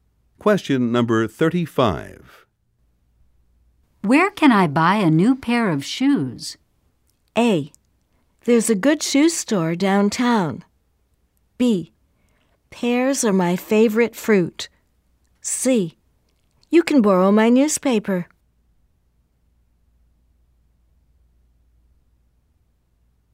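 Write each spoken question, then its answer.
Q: Where can I buy a new pair of shoes?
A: A: There's a good shoe store downtown.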